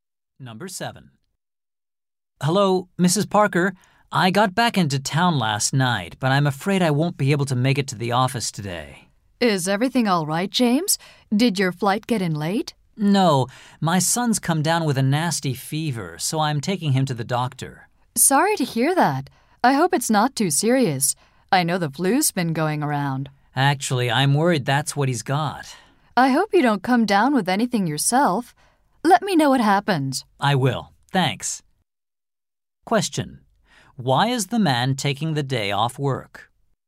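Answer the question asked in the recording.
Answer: To take his sick son to the doctor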